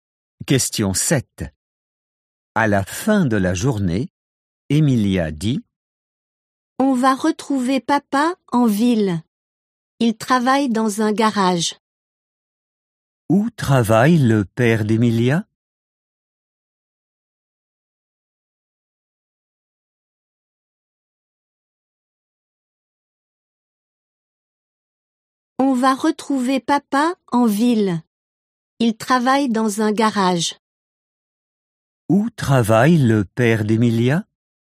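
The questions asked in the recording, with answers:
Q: Où travaille le père d'Emilia?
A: Dans un garage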